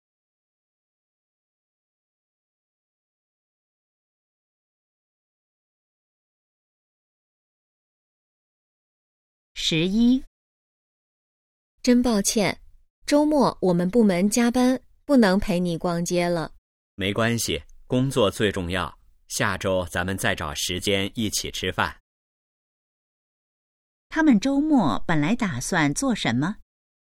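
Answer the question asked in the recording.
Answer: 逛街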